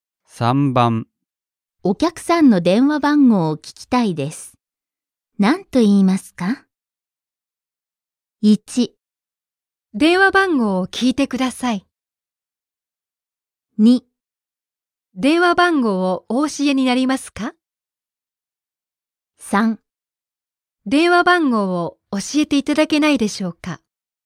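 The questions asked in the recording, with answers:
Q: お客さんの電話番号を聞きたいです。何と言いますか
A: 3: 電話番号を教えていただけないでしょうか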